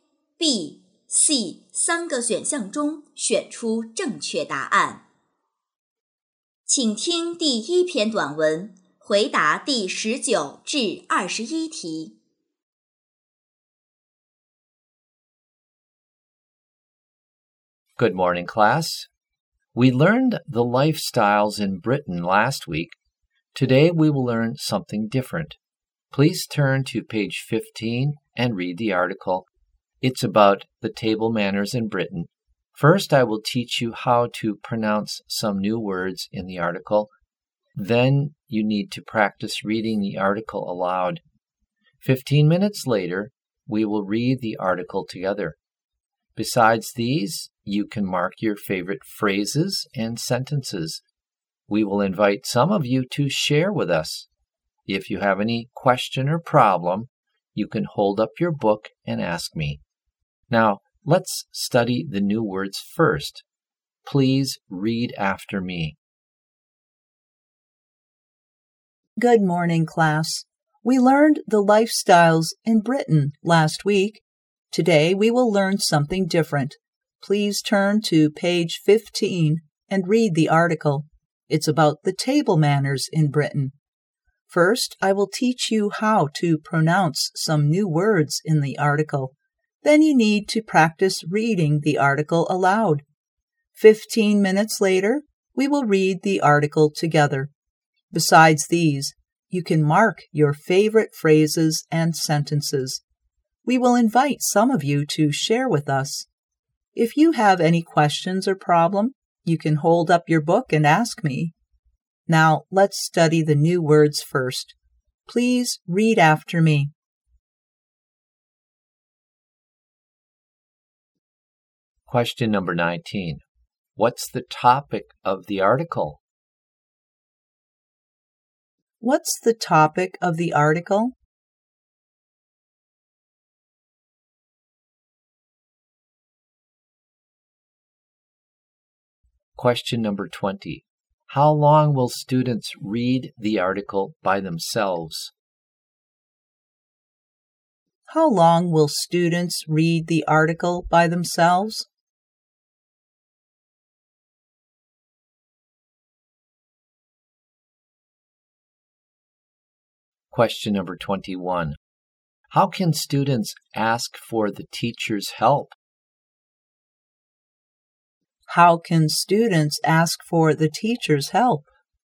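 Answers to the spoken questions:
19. Table manners in Britain
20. 15 minutes
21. By holding up their books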